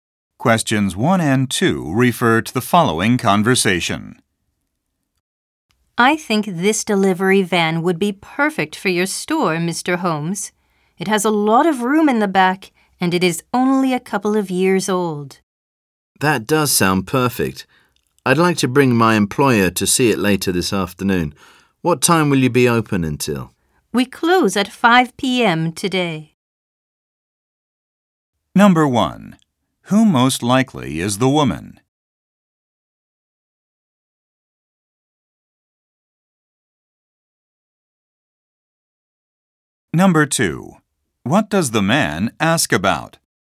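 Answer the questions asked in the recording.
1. A vehicle salesperson
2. What time they are open until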